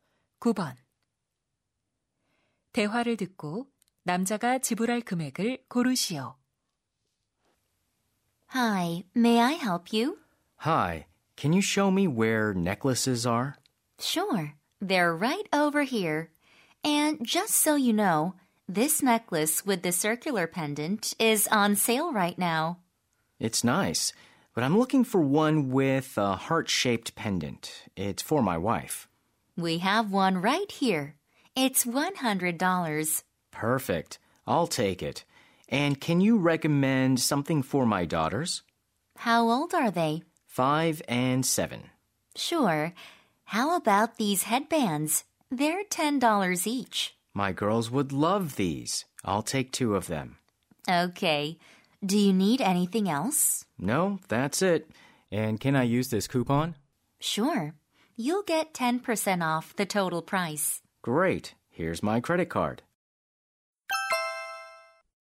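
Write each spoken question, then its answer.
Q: 대화를 듣고 남자가 지불할 금액을 고르시오.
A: $108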